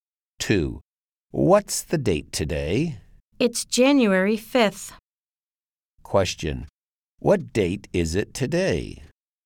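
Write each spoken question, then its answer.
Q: Question. What date is it today?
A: January 5th.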